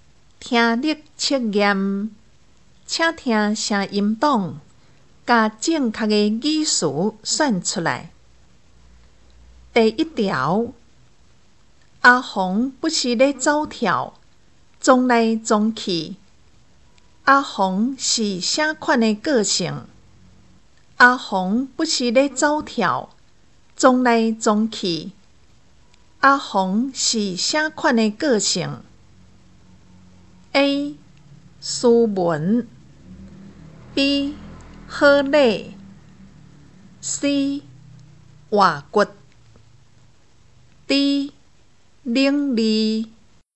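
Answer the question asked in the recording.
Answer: C: 活骨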